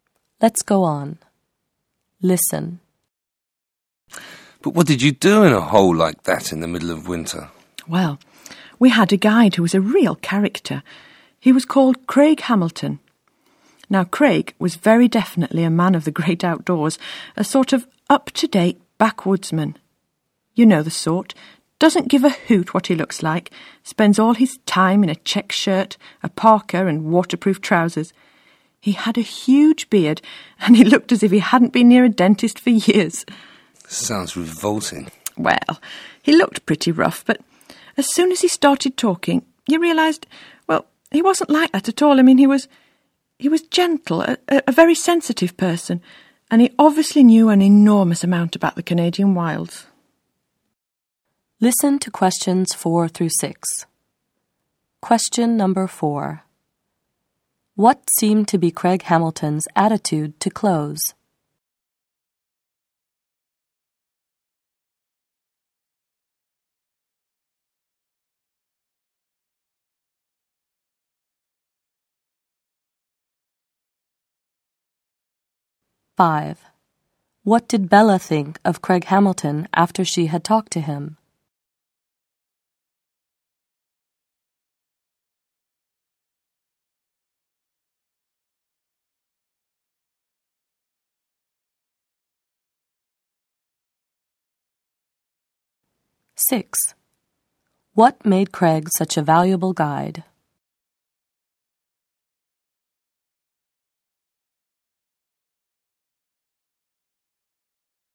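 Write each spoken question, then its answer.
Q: What seemed to be Craig Hamilton's attitude to clothes?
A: He didn't care what he looked like

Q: What did Bella think of Craig Hamilton after she had talked to him?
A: He was gentle and very sensitive

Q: What made Craig such a valuable guide?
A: He knew an enormous amount about the Canadian wilds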